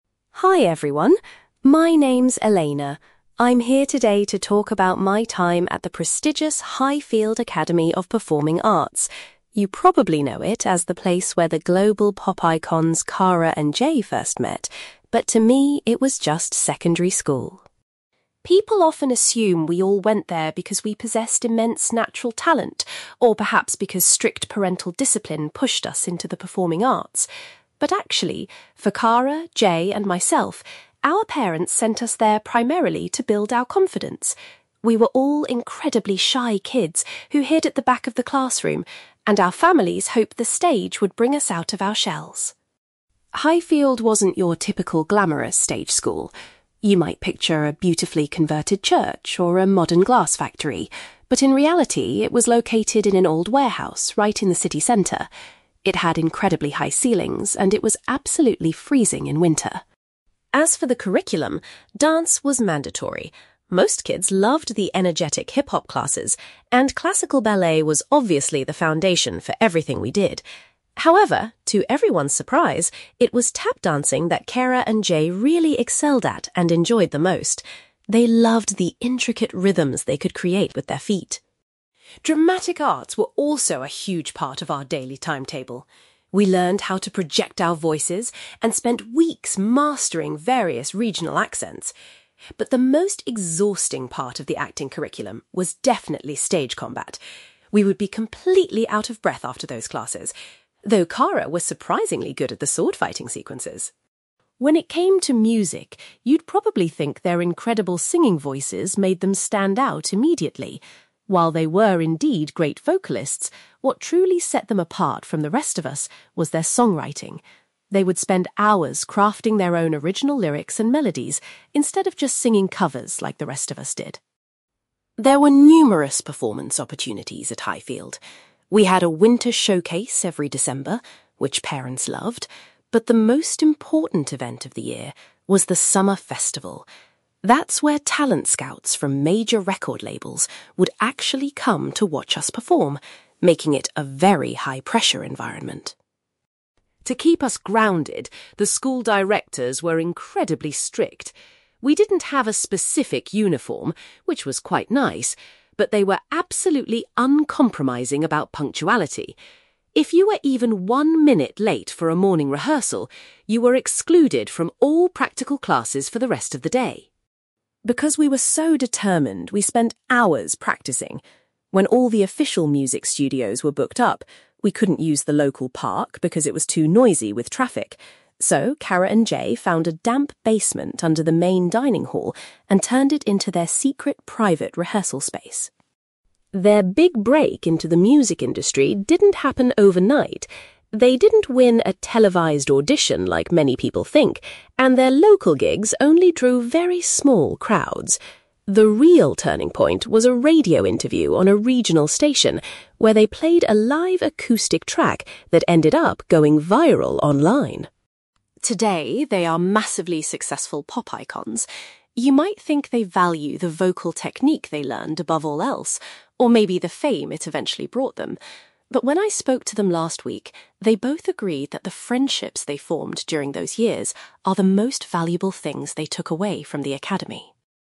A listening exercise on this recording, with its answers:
You will hear a woman called Elena giving a presentation about attending a stage school with two future pop icons. For questions 9-18, complete the sentences with a word or short phrase.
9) Elena says that the main reason the three of them attended the school was to improve their (9)........................... .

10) Elena reveals that the stage school was actually situated in an old (10)........................... .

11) Elena mentions that both Cara and Jay particularly enjoyed and excelled at (11)........................... .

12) Elena found the lessons in (12)........................... to be the most tiring part of the drama course.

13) Elena explains that it was their talent for (13)........................... that made Cara and Jay stand out from their peers.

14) Elena states that the school's (14)........................... was the event most frequently attended by industry professionals.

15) Elena remembers that the school directors were extremely strict regarding (15)...........................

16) Because the studios were busy, Cara and Jay used a (16)........................... as a practice room.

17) Cara and Jay's career took off after they did a (17)........................... on a local station.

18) According to Elena, Cara and Jay believe that the (18)........................... they made at the school are what they treasure most.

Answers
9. confidence
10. warehouse
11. tap dancing
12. stage combat
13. songwriting
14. summer festival
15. punctuality
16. basement
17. radio interview
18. friendships

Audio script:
Elena: Hi everyone. My name's Elena. I'm here today to talk about my time at the prestigious Highfield Academy of Performing Arts. You probably know it as the place where the global pop icons Cara and Jay first met, but to me, it was just secondary school.
People often assume we all went there because we possessed immense natural talent, or perhaps because strict parental discipline pushed us into the performing arts. But actually, for Cara, Jay, and myself, our parents sent us there primarily to build our confidence. We were all incredibly shy kids who hid at the back of the classroom, and our families hoped the stage would bring us out of our shells.
Highfield wasn't your typical glamorous stage school. You might picture a beautifully converted church or a modern glass factory, but in reality, it was located in an old warehouse right in the city centre. It had incredibly high ceilings and it was absolutely freezing in winter!
As for the curriculum, dance was mandatory. Most kids loved the energetic hip-hop classes, and classical ballet was obviously the foundation for everything we did. However, to everyone's surprise, it was tap dancing that Cara and Jay really excelled at and enjoyed the most. They loved the intricate rhythms they could create with their feet.
Dramatic arts were also a huge part of our daily timetable. We learned how to project our voices and spent weeks mastering various regional accents. But the most exhausting part of the acting curriculum was definitely stage combat. We would be completely out of breath after those classes, though Cara was surprisingly good at the sword-fighting sequences!
When it came to music, you'd probably think their incredible singing voices made them stand out immediately. While they were indeed great vocalists, what truly set them apart from the rest of us was their songwriting. They would spend hours crafting their own original lyrics and melodies instead of just singing covers like the rest of us did.
There were numerous performance opportunities at Highfield. We had a winter showcase every December, which parents loved, but the most important event of the year was the summer festival. That's where talent scouts from major record labels would actually come to watch us perform, making it a very high-pressure environment.
To keep us grounded, the school directors were incredibly strict. We didn't have a specific uniform, which was quite nice, but they were absolutely uncompromising about punctuality. If you were even one minute late for a morning rehearsal, you were excluded from all practical classes for the rest of the day.
Because we were so determined, we spent hours practicing. When all the official music studios were booked up, we couldn't use the local park because it was too noisy with traffic. So, Cara and Jay found a damp basement under the main dining hall and turned it into their secret, private rehearsal space.
Their big break into the music industry didn't happen overnight. They didn't win a televised audition like many people think, and their local gigs only drew very small crowds. The real turning point was a radio interview on a regional station, where they played a live acoustic track that ended up going viral online.
Today, they are massively successful pop icons. You might think they value the vocal technique they learned above all else, or maybe the fame it eventually brought them. But when I spoke to them last week, they both agreed that the friendships they formed during those years are the most valuable things they took away from the academy.

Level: B2